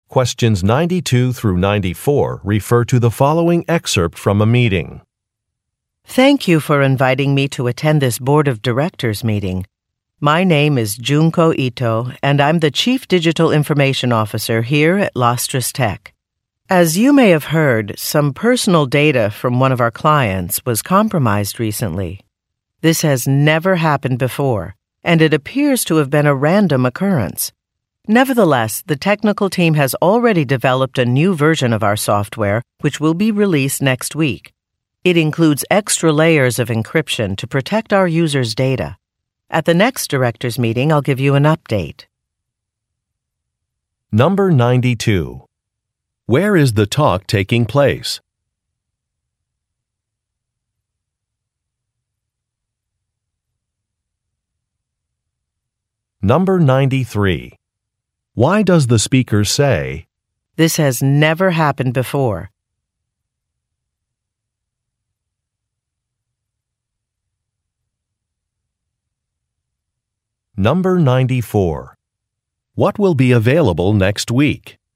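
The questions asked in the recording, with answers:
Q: Where is the talk taking place?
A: At a board of directors meeting

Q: What will be available next week?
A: A new version of the company's software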